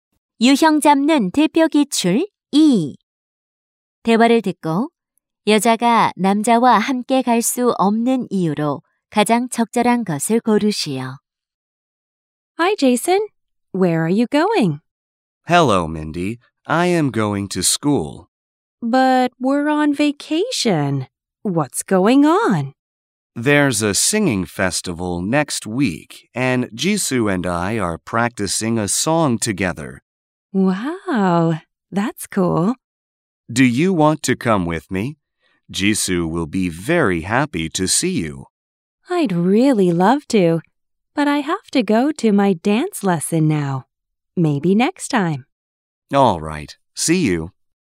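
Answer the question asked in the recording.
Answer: 댄스 레슨에 가야 해서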